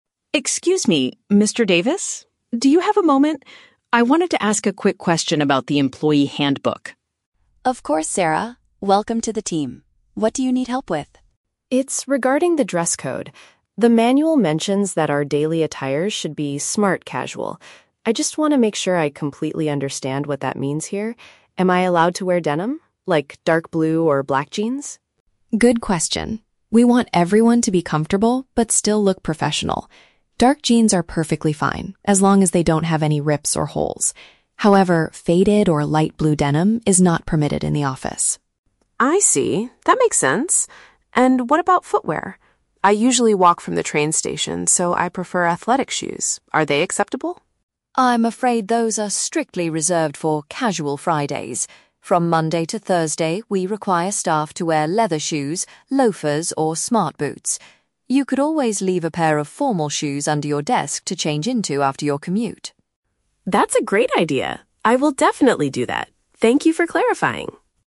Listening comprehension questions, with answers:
Listen to the conversation between a new employee and an HR Manager. For each question, choose the correct answer (A, B, or C).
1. Why does Sarah approach Mr. Davis?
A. To request a new copy of the employee manual.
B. To seek clarification on the office clothing guidelines.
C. To suggest changes to the "Casual Friday" policy.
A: To seek clarification on the office clothing guidelines.

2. Which type of trousers is Sarah permitted to wear on a regular workday?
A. Light-colored jeans without any holes.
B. Shorts that are comfortable for walking.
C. Trousers made of dark denim material.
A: Trousers made of dark denim material.

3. How will Sarah solve her daily footwear problem?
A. She will keep suitable shoes at her workplace to swap into.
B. She will wear her sports shoes exclusively on Fridays.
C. She will buy a new pair of leather boots for her commute.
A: She will keep suitable shoes at her workplace to swap into.

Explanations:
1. Sarah wants to ask a question about the "dress code" and "daily attire," which is paraphrased as "office clothing guidelines." Option A is not mentioned; she already has the manual. Option C is a trap because "Casual Friday" is mentioned later in the audio, but she is not suggesting any changes to the rules.
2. Mr. Davis confirms that "Dark jeans are perfectly fine." "Jeans" are paraphrased as "trousers made of denim." Option A is a trap because Mr. Davis explicitly states that "light-blue denim is not permitted." Option B is plausible for comfort, but shorts are never mentioned in the conversation.
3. Mr. Davis suggests she "leave a pair of formal shoes under your desk to change into," and Sarah agrees that it is a "great idea." This is paraphrased as keeping suitable shoes at her workplace to swap into. Option B is a trap; while athletic shoes are allowed on Fridays, this doesn't solve her Monday-Thursday walking problem. Option C is a trap because leather boots are mentioned as acceptable wear, but she is not buying them for her outdoor commute.

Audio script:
Sarah: Excuse me, Mr. Davis? Do you have a moment? I wanted to ask a quick question about the employee handbook.
Mr. Davis: Of course, Sarah. Welcome to the team. What do you need help with?
Sarah: It's regarding the dress code. The manual mentions that our daily attire should be "smart casual." I just want to make sure I completely understand what that means here. Am I allowed to wear denim? Like, dark blue or black jeans?
Mr. Davis: Good question. We want everyone to be comfortable, but still look professional. Dark jeans are perfectly fine, as long as they don't have any rips or holes. However, faded or light-blue denim is not permitted in the office.
Sarah: I see. That makes sense. And what about footwear? I usually walk from the train station, so I prefer athletic shoes. Are they acceptable?
Mr. Davis: I'm afraid those are strictly reserved for "Casual Fridays." From Monday to Thursday, we require staff to wear leather shoes, loafers, or smart boots. You could always leave a pair of formal shoes under your desk to change into after your commute!
Sarah: That's a great idea. I will definitely do that. Thank you for clarifying!

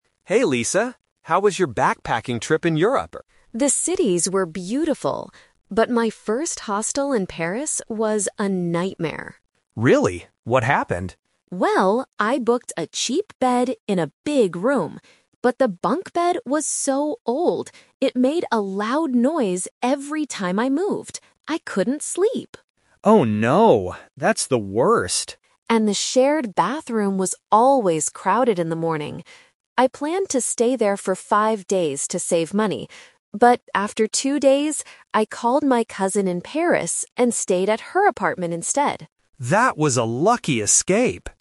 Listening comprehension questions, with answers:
Listen to a conversation between two friends about a trip to Europe. Choose the correct answer (A, B, or C) for each question.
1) What was the problem with Lisa's bed?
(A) It was very expensive.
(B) It made a lot of noise.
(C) It was too small.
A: It made a lot of noise.

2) Why was Lisa unhappy with the bathroom?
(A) It was closed in the morning.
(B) It was too dirty.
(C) There were too many people using it.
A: There were too many people using it.

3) What did Lisa decide to do after two days? (The Twist)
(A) She moved to her cousin's apartment.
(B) She stayed at the hostel for five days.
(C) She booked a new hotel room.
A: She moved to her cousin's apartment.

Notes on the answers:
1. Lisa says the bunk bed was old and "made a loud noise every time I moved."
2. Lisa mentions that the shared bathroom was "always crowded in the morning." Crowded means there are too many people.
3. This is the Twist. Lisa couldn't handle the noise and the crowds, so she changed her plan. She says, "I called my cousin in Paris and stayed at her apartment instead."

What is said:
Ben: Hey Lisa. How was your backpacking trip in Europe?
Lisa: The cities were beautiful, but my first hostel in Paris was a nightmare.
Ben: Really? What happened?
Lisa: Well, I booked a cheap bed in a big room. But the bunk bed was so old. It made a loud noise every time I moved. I couldn't sleep!
Ben: Oh no. That's the worst.
Lisa: And the shared bathroom was always crowded in the morning. I planned to stay there for five days to save money. But after two days, I called my cousin in Paris and stayed at her apartment instead.

